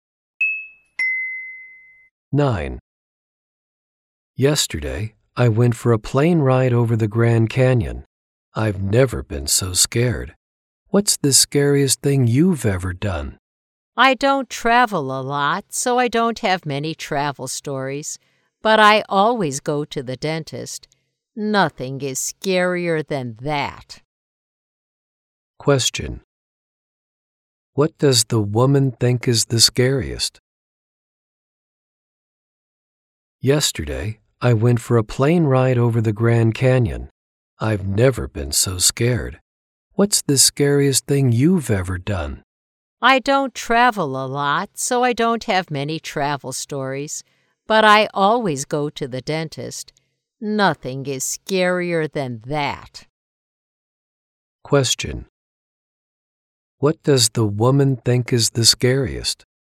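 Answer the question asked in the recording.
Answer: Going to the dentist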